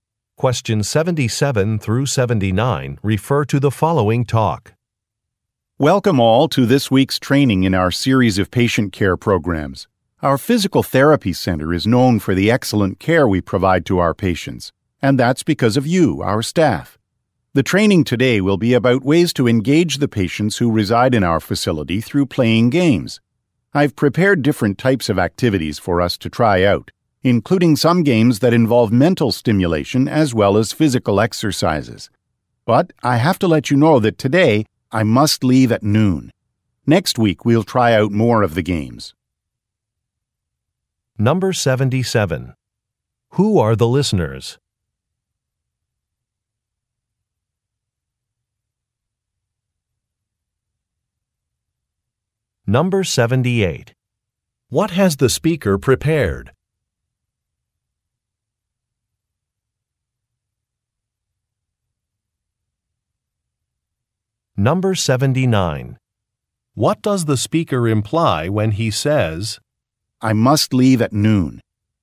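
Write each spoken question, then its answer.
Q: Who are the listeners?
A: Staff at a physical therapy center

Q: What has the speaker prepared?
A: Different types of game activities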